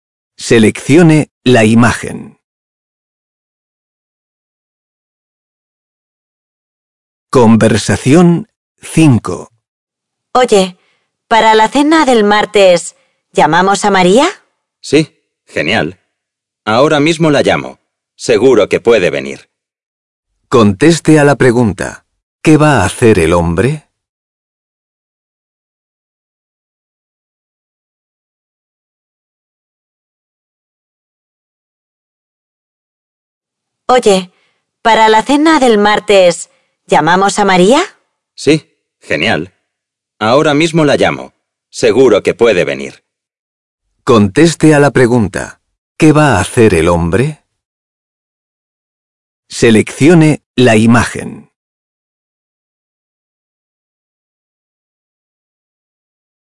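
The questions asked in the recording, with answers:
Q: ¿qué va a hacer el hombre?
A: Llamar a María por teléfono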